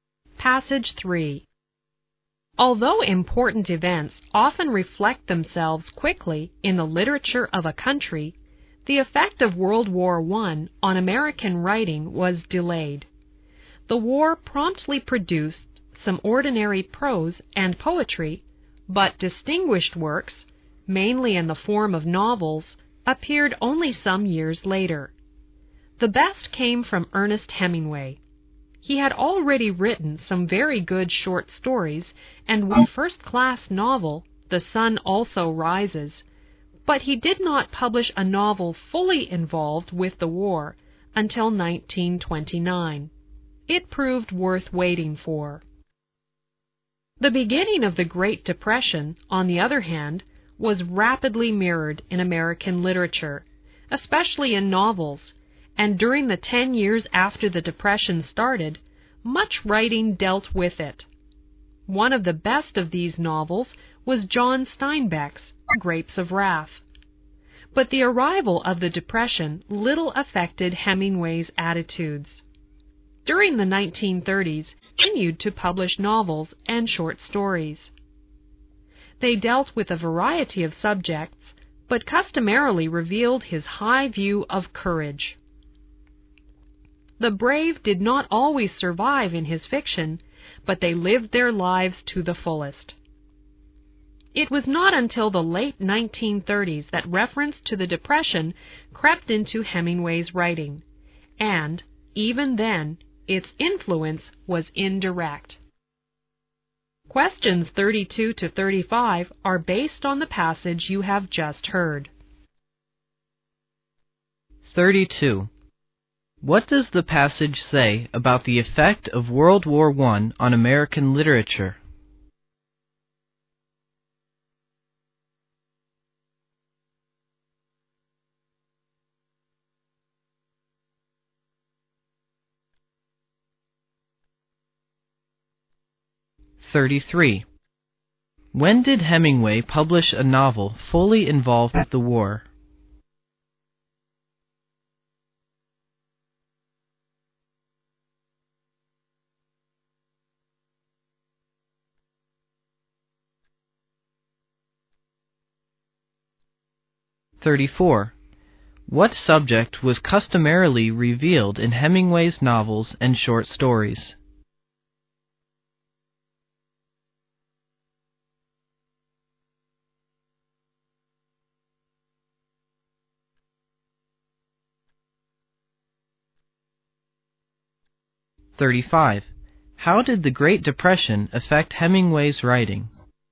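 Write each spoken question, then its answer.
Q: What does the passage say about the effect of World War I on American literature?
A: It was delayed

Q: When did Hemingway publish a novel fully involved with the war?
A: In 1929

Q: What subject was customarily revealed in Hemingway's novels and short stories?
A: Courage

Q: How did the Great Depression affect Hemingway's writing?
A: Only indirectly, and not until the late 1930s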